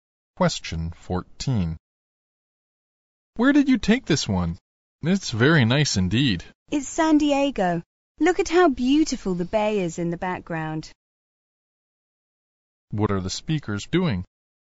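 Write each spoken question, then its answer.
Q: What are the speakers doing?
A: Looking at photos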